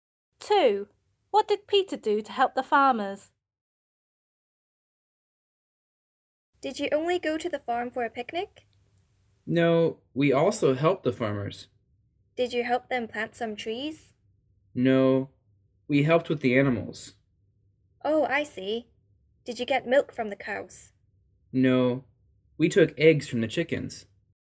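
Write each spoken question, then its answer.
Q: What did Peter do to help the farmers?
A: He took eggs from the chickens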